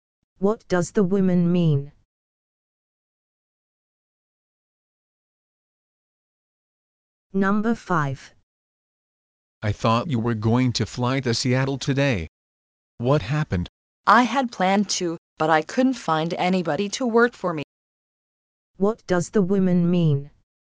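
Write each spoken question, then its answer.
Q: What does the woman mean?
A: She didn't go because she couldn't find anyone to work for her.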